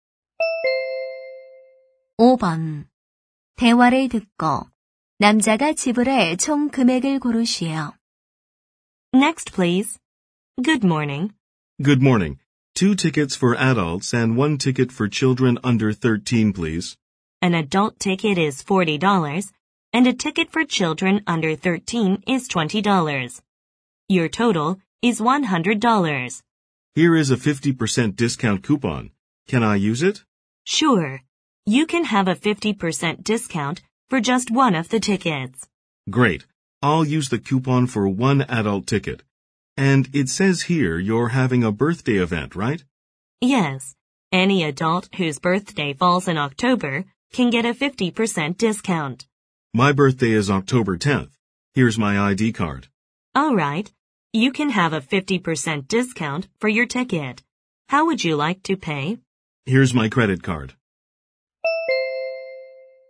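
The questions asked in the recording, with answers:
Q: 대화를 듣고 남자가 지불할 총 금액을 고르시오.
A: 60달러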